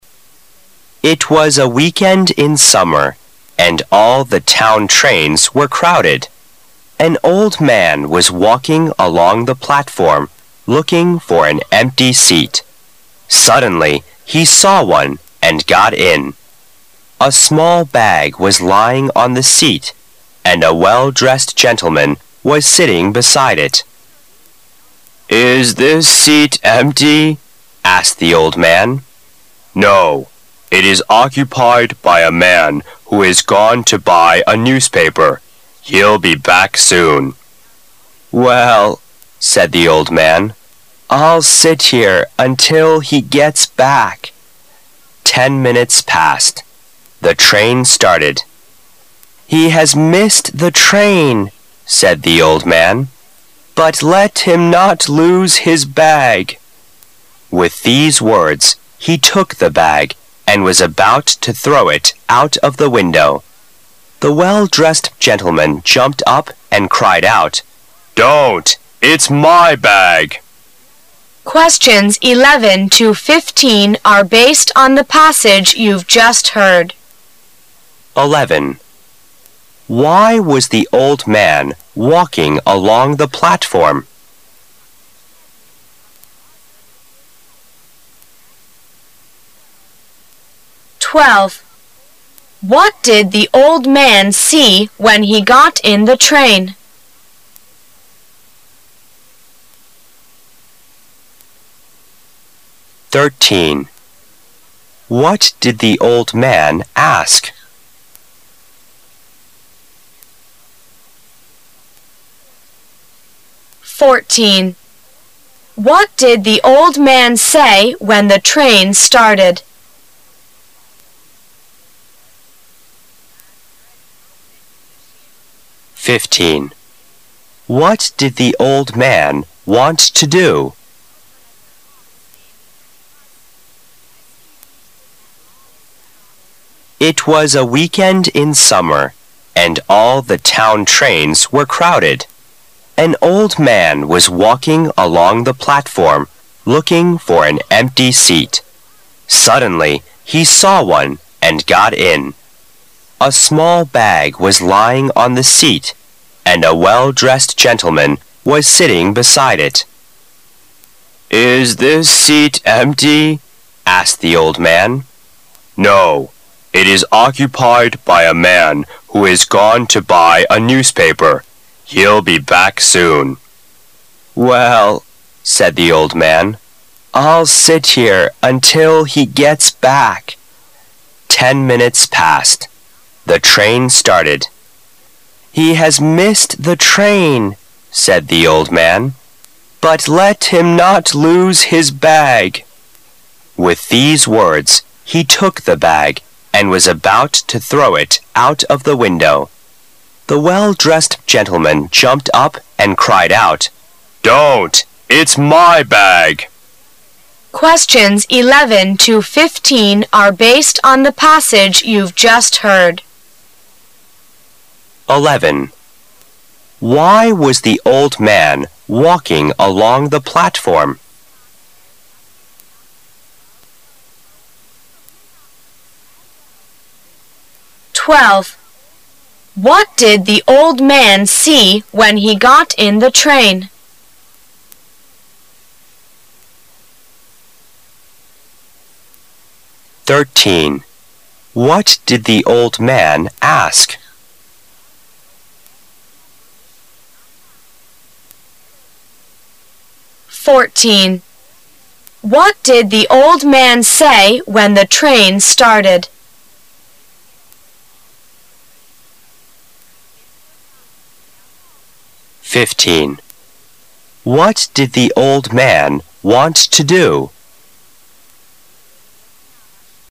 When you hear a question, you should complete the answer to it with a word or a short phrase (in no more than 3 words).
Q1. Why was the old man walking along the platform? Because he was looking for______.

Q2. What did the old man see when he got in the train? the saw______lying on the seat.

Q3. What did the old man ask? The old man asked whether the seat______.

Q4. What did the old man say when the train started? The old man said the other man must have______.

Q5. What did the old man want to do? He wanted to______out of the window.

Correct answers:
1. an empty seat
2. a small handbag
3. was empty
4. missed the train
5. throw the bag

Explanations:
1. 由问题和答案的其他部分可知这里需要填入名词词组。所有的火车上都是人满为患,根据An old man was walking along the platform,looking for an empty seat,可以得出答案。
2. 由问题和答案的其他部分可知这里需要填人名词词组。突然看到了—个空座,A small bag was lying on the seat,旁边还有一位穿着入时的绅士,可以写出正确答案。
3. 由问题和答案的其他部分可知这里需要填入从句中的谓语部分。根据"Is this seat empty?" asked the old man,也可以结合第十一题,写出答案。
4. 由问题和答案的其他部分可知这里需要填人动词词组。火车开车后,老人说道,"He has missed the train,"可以写出答案。
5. 由问题和答案的其他部分可知这里需要填入动词词组。说完这些话后,he took the bag and was about to throw out Of the window,据此写出答案。

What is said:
[解析] 11-15 It was a weekend in summer and all the town trains were crowded. An old man was walking along the platform, looking for an empty seat. Suddenly he saw one and got in. A small bag was lying on the seat and a well-dressed gentleman was sitting beside it. "Is this seat empty?" asked the old man. "No, it is occupied by a man who has gone to buy a newspaper. He'll be back soon." "Well", said the old man, I'II sit here until he gets back." Ten minutes passed. The train started. "He has missed the train," said the old man, "but let him not lose his bag." With these wonts he took the bag and was about to throw it out of the window. The well-dressed gentleman jumped up and cried out. "Don't! It's my bag !"